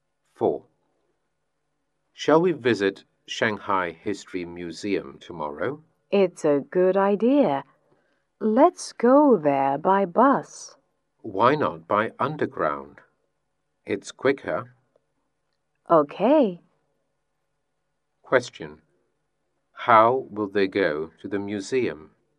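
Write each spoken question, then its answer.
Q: How will they go to the museum?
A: By underground.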